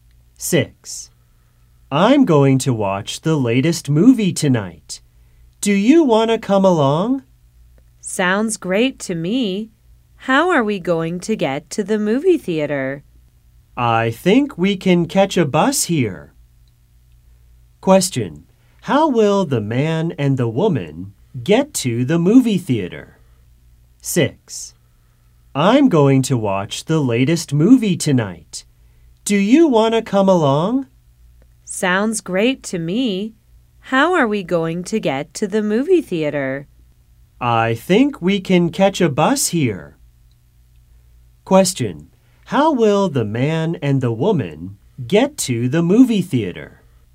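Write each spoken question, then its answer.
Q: Question, how will the man and the woman get to the movie theater?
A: By bus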